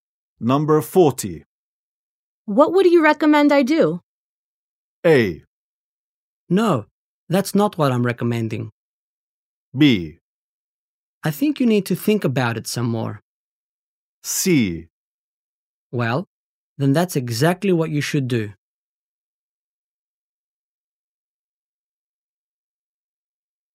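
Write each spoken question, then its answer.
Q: What would you recommend I do?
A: B: I think you need to think about it some more.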